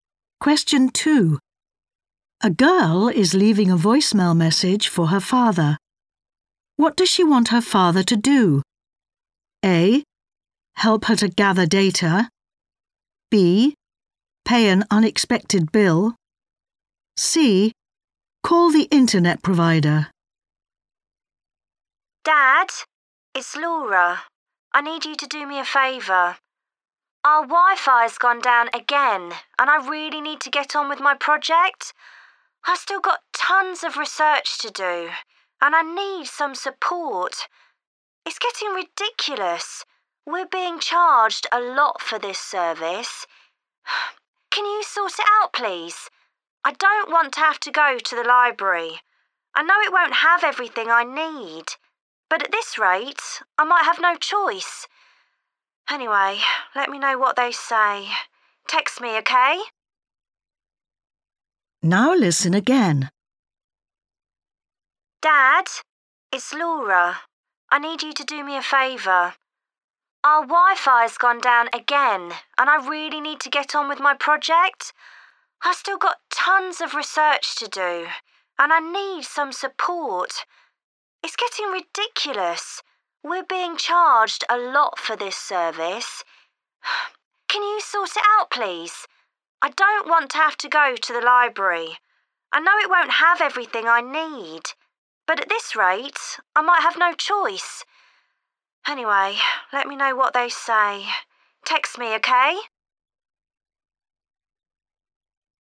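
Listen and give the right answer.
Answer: C: Call the internet provider.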